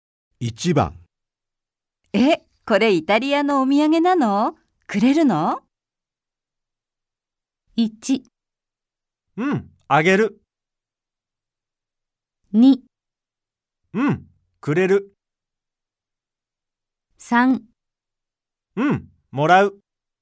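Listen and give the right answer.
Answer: 1: うん、あげる。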